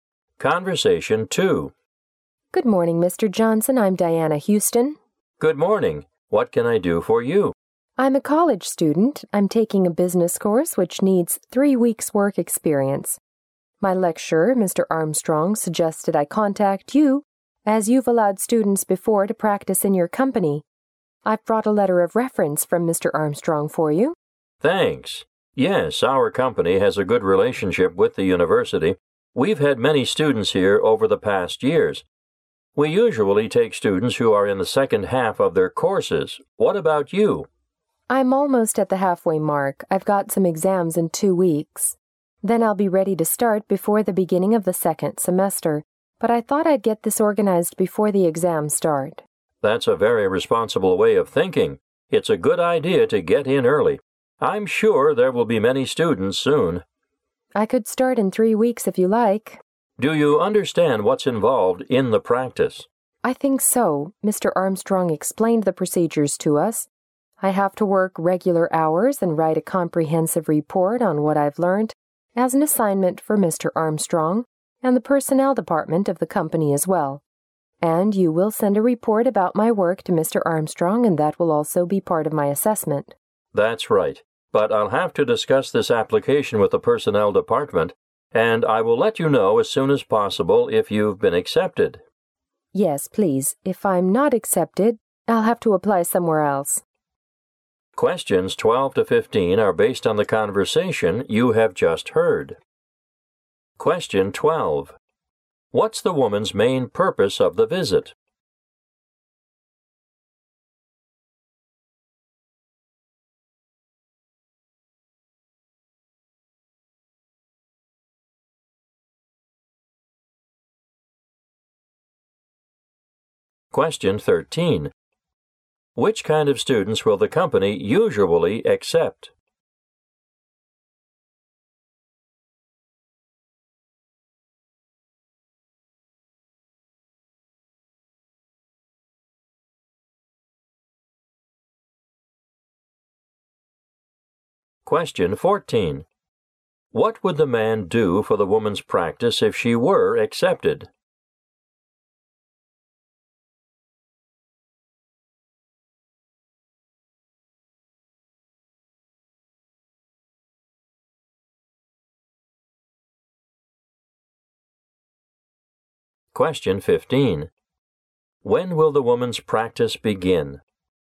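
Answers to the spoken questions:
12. To apply for a work-experience placement.
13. Students in the second half of their courses.
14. Send a report about her work to Mr. Armstrong.
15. In 3 weeks, before the second semester.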